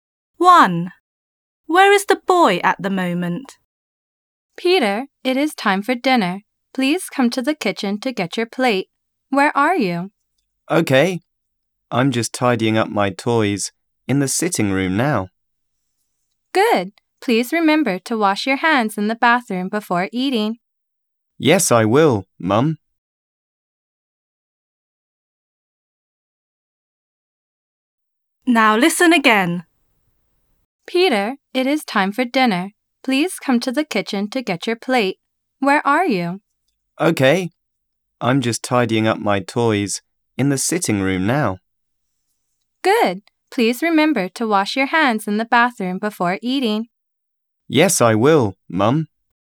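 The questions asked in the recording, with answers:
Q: Where is the boy at the moment?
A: In the sitting room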